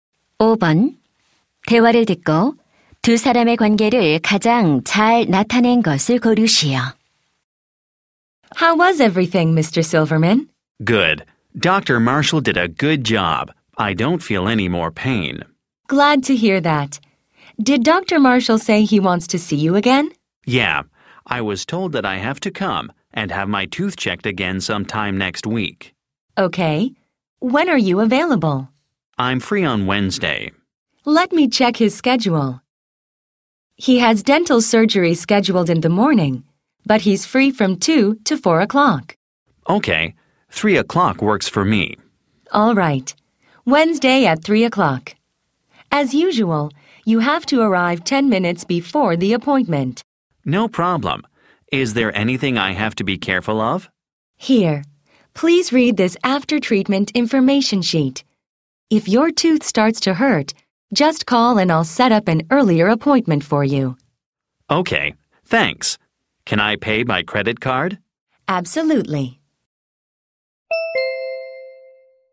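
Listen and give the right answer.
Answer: 치과 접수 직원 - 환자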